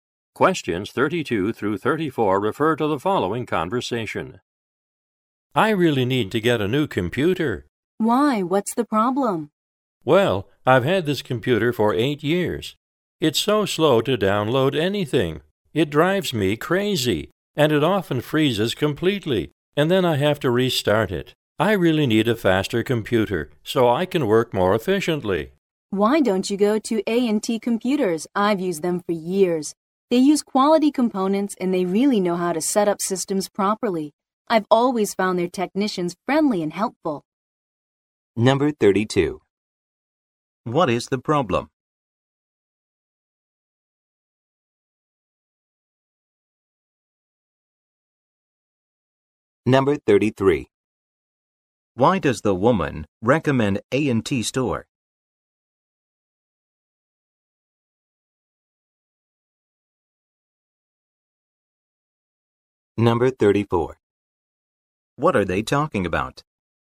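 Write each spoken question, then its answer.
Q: Why does the woman recommend A&T store?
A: They use quality components and have friendly, skilled technicians

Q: What are they talking about?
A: Getting a new computer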